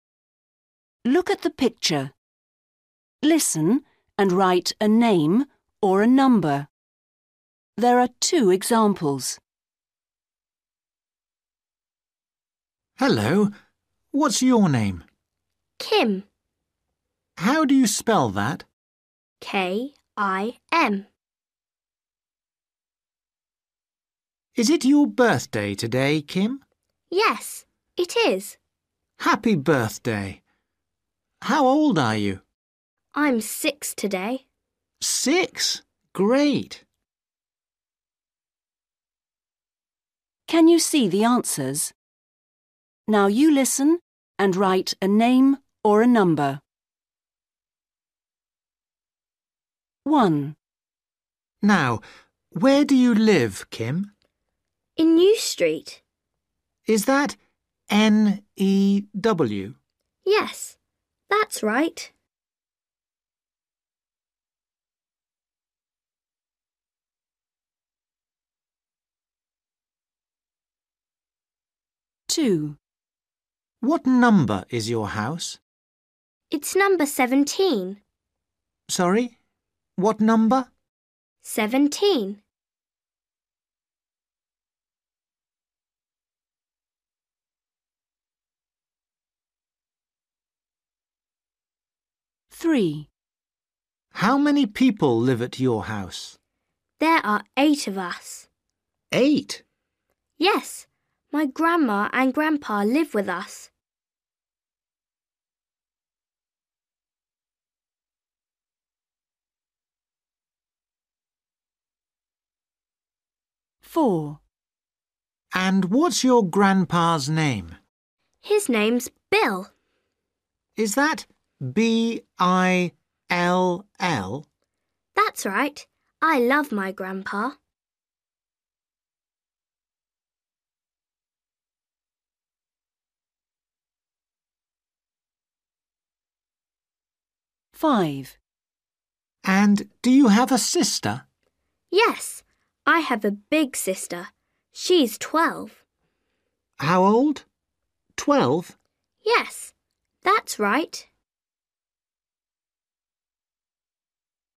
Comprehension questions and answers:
Read the question. Listen and write a name or a number.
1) Where does Kim live? ........................... Street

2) What number is Kim's house? ...........................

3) How many people live in Kim's house? ...........................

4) What's Kim's grandpa's name? ...........................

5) How old is Kim's sister? ...........................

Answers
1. New
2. 17/seventeen
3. 8/eight
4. Bill
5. 12/twelve

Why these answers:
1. MAN: Now, where do you live, Kim? GIRL: In New Street. MAN: Is that N-E-W? GIRL: Yes, that's right.
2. MAN: What number is your house? GIRL: It's number seventeen. MAN: Sorry? What number? GIRL: Seventeen.
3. MAN: How many people live at your house? GIRL: There are eight of us. MAN: Eight? GIRL: Yes. My grandma and grandpa live with us.
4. MAN: And what's your grandpa's name? GIRL: His name's Bill. MAN: Is that B-I-L-L? GIRL: That's right. I love my grandpa.
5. MAN: And do you have a sister? GIRL: Yes. I have a big sister. She's twelve. MAN: How old? Twelve? GIRL: Yes, that's right.

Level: Starters